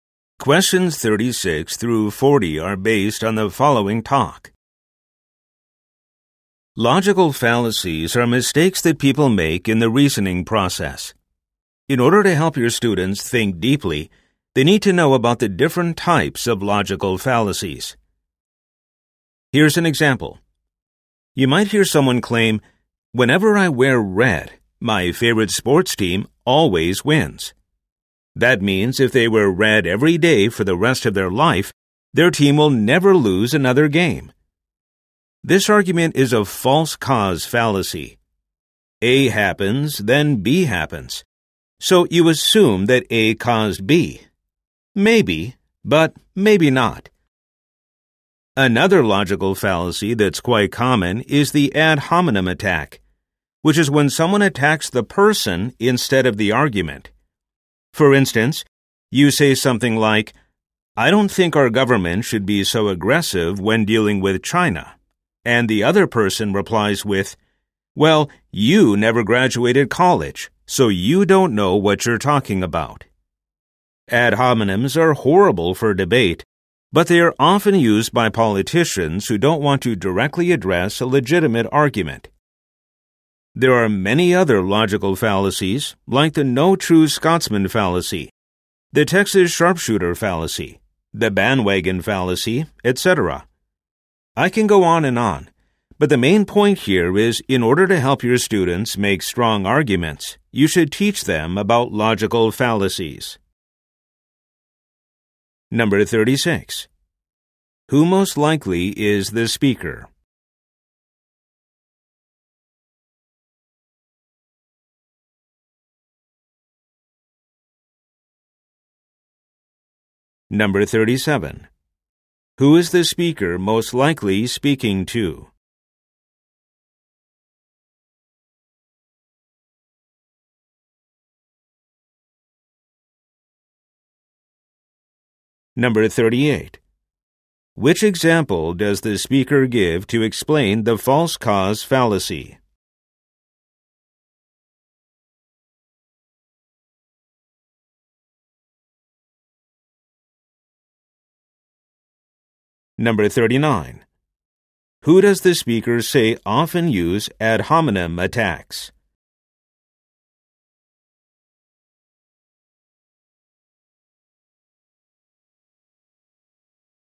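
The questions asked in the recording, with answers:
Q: Who is the speaker most likely speaking to?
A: Teachers

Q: Which example does the speaker give to explain the false cause fallacy?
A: Wearing red makes a favorite team win

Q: Who does the speaker say often use ad hominem attacks?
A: Politicians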